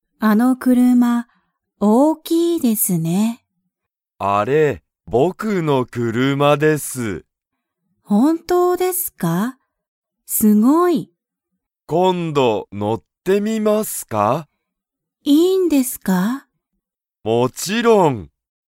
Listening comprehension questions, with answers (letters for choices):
Comprehension Quiz (Skip if you don't understand the conversation yet)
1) 本田ほんださんの車くるまは____。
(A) はやい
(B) かわいい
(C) 安(やす)い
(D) 大(おお)きい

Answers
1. D

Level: Level 1